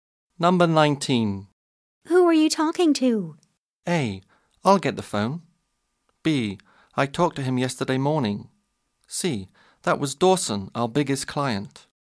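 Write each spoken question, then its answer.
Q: Who are you talking to?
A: C: That was Dawson, our biggest client.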